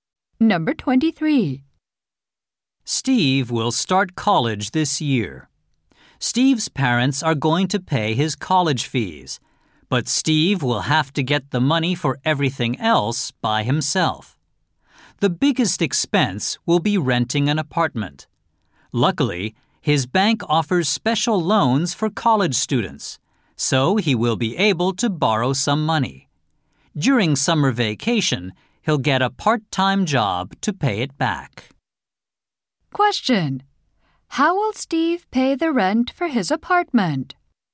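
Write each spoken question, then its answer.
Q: How will Steve pay the rent for his apartment?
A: With a student loan from his bank.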